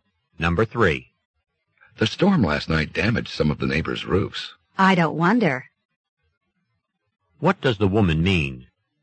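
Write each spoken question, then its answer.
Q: What does the woman mean?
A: She is not surprised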